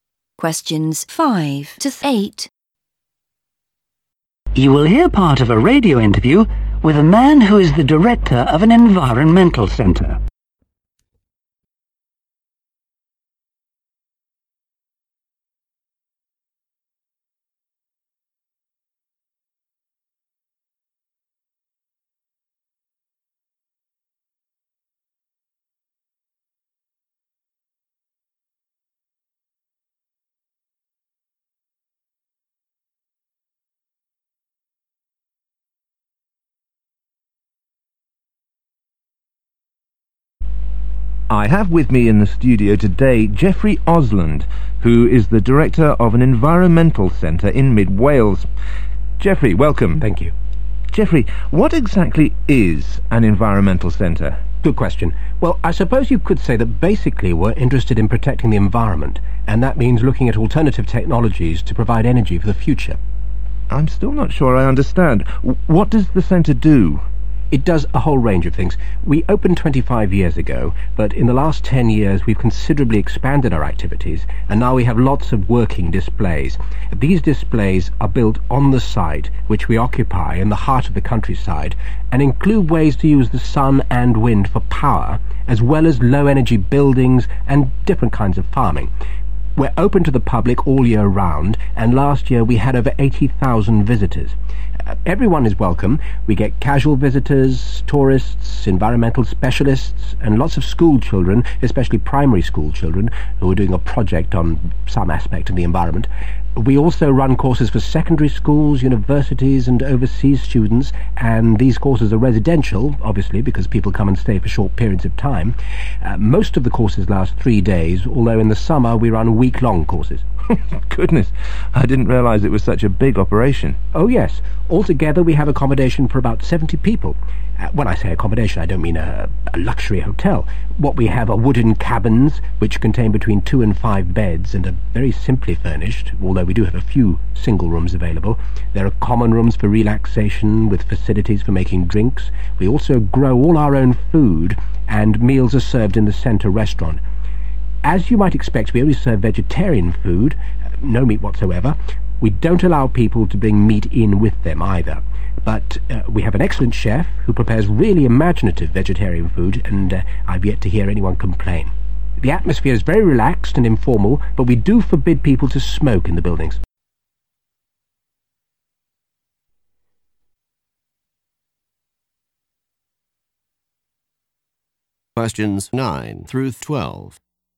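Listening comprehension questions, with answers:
When was the Center established?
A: 25 years ago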